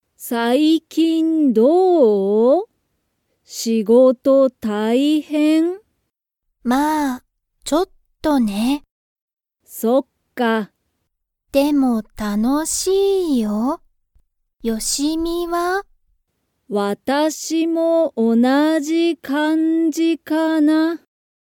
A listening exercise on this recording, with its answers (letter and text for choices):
Comprehension Quiz (Skip if you don't understand the conversation yet)(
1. モモカは、仕事(しごと)が楽(たの)しいですか?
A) はい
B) いいえ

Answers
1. A) はい

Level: Level 1